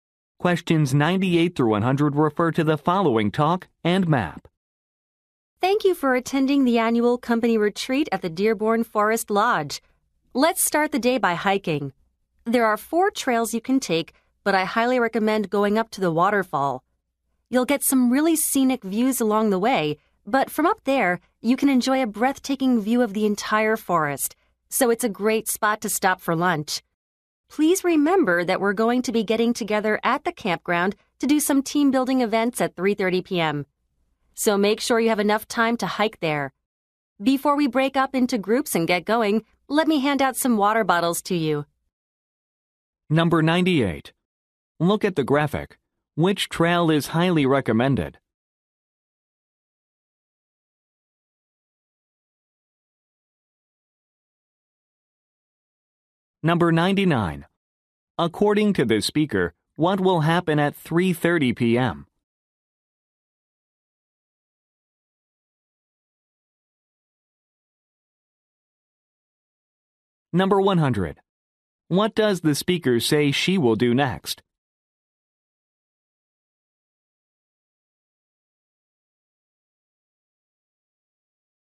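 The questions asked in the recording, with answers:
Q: According to the speaker, what will happen at 3:30 p.m.?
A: Team-building events at the campground

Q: What does the speaker say she will do next?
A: Hand out water bottles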